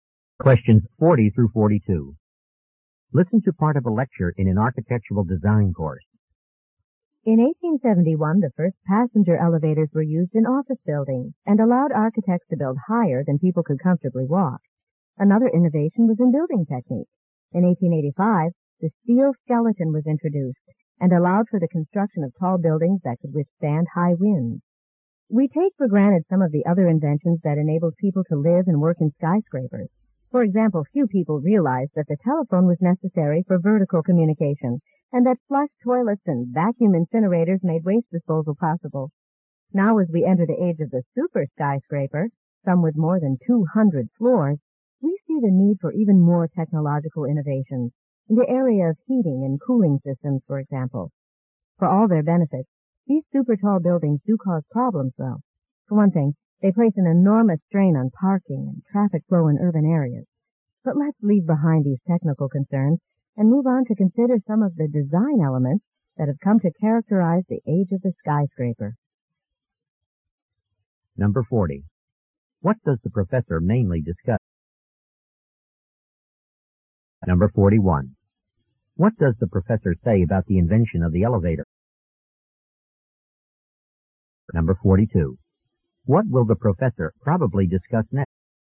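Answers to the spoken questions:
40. Inventions that made skyscrapers possible.
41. It let architects build higher than people could comfortably walk.
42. Design elements of skyscrapers.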